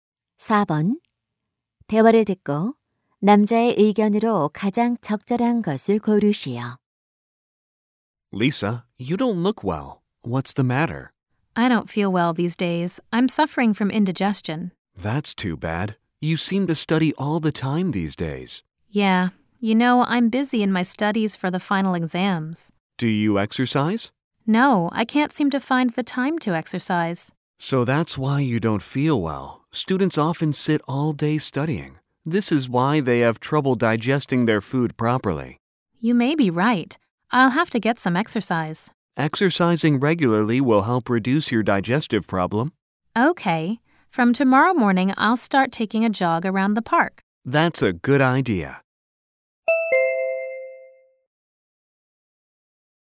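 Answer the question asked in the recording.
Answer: 규칙적인 운동은 소화 문제 개선에 도움이 된다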